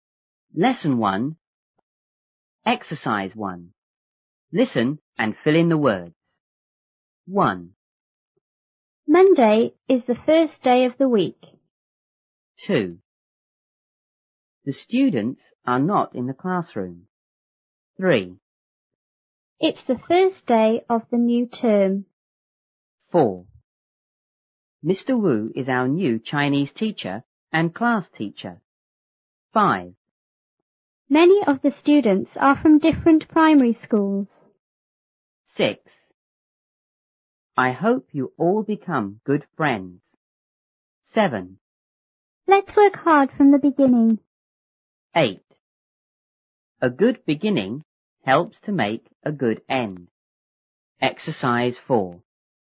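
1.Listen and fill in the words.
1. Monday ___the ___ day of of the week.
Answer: is; first

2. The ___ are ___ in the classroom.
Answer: students; not

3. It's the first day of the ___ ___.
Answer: new term

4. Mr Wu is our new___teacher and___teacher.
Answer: Chinese; class

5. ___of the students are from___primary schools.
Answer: Many; different

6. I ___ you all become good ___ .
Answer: hope; friends

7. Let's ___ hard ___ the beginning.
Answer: work; from

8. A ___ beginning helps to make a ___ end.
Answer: good; good

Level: 初中英语广州版1B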